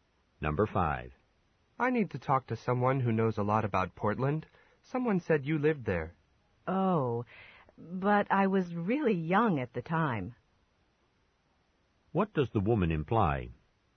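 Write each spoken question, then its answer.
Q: What does the woman imply?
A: She doesn't remember much about Portland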